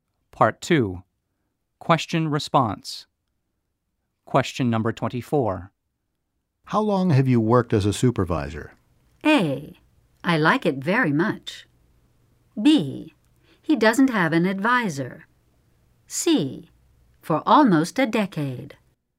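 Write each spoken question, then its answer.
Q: How long have you worked as a supervisor?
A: C: For almost a decade.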